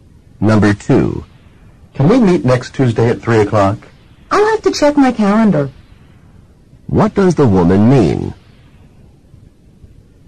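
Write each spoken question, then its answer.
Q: What does the woman mean?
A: She needs to check her calendar first.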